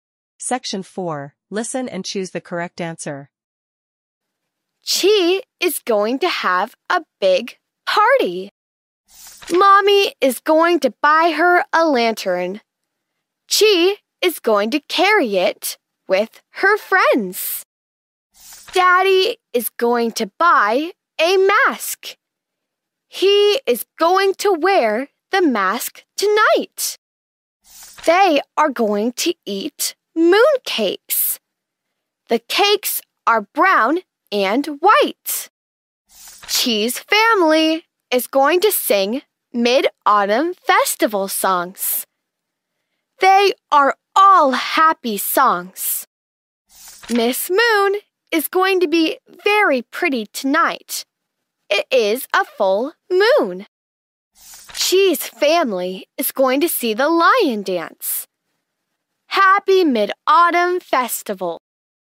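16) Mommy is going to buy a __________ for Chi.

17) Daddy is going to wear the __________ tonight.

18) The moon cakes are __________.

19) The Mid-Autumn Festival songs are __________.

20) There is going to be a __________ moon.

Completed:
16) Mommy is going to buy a lantern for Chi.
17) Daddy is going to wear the mask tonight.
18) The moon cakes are brown and white.
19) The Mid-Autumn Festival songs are happy.
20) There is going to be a full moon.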